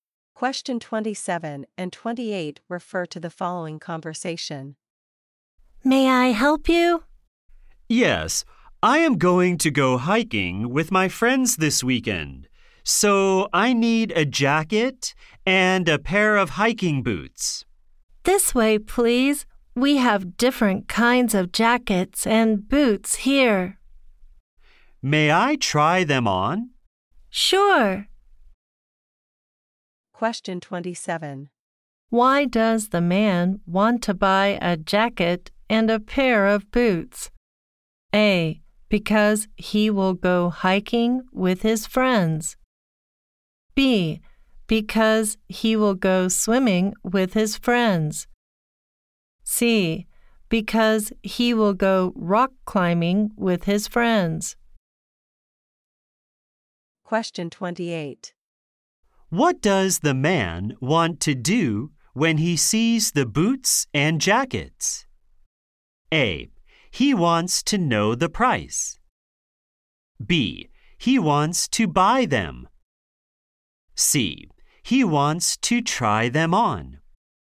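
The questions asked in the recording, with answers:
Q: Why does the man want to buy a jacket and a pair of boots?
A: A: Because he will go hiking with his friends.

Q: What does the man want to do when he sees the boots and jackets?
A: C: He wants to try them on.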